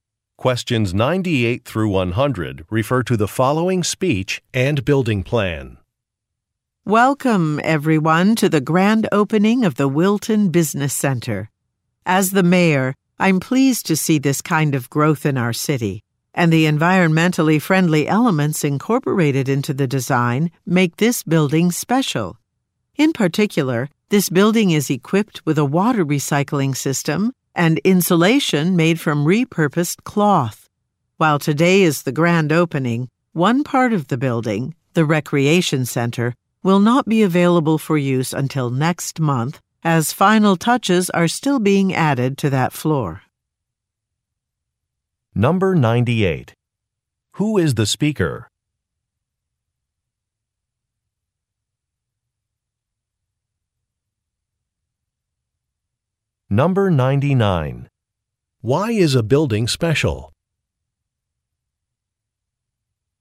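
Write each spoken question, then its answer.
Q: Who is the speaker?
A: The mayor

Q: Why is a building special?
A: It has environmentally friendly features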